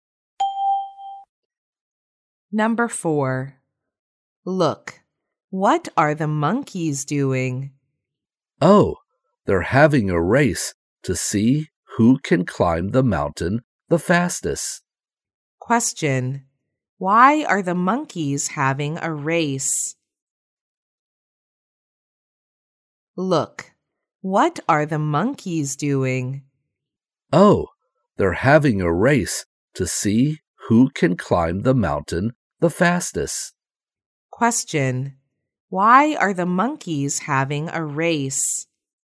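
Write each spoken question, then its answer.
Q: Why are the monkeys having a race?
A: To see who can climb the mountain the fastest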